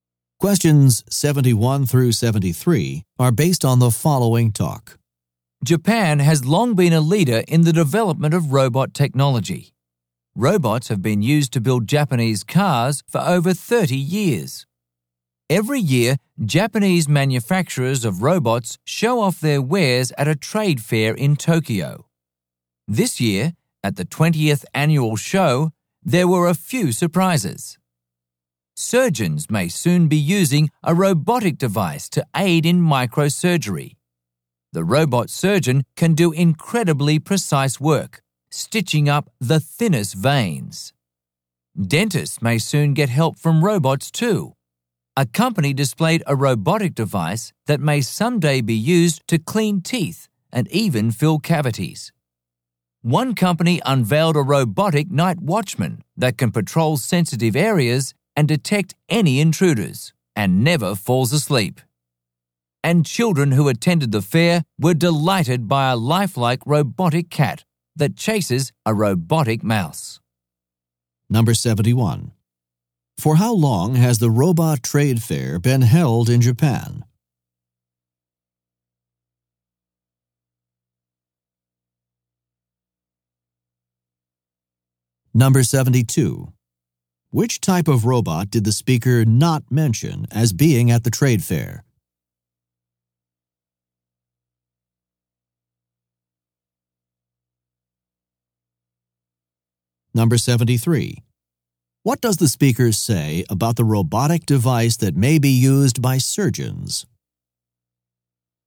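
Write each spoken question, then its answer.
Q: For how long has the robot trade fair been held in Japan?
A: 20 years

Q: What does the speaker say about the robotic device that may be used by surgeons?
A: It can do very precise work, stitching up the thinnest veins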